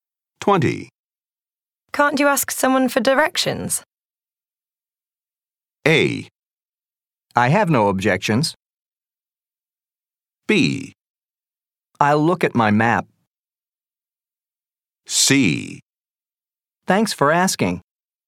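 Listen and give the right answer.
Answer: B: I'll look at my map.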